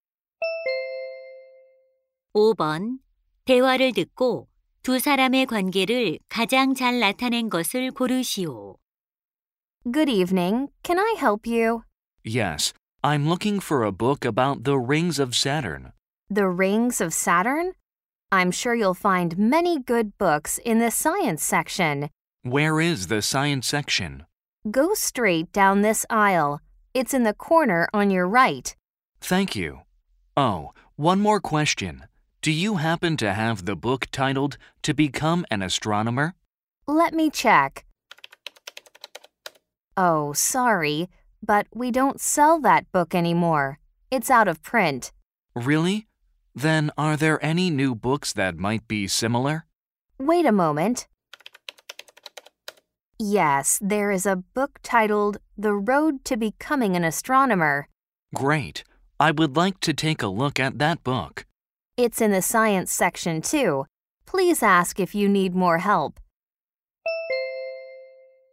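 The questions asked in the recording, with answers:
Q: 대화를 듣고 두 사람의 관계를 가장 잘 나타낸 것을 고르시오.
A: 서점 직원 - 손님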